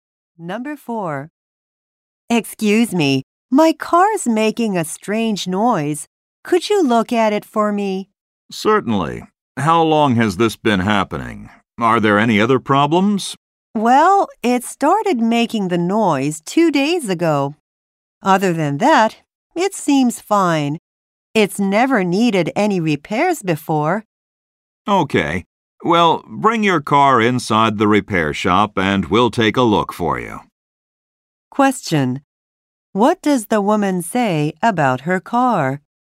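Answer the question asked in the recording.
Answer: It has never needed repairs before.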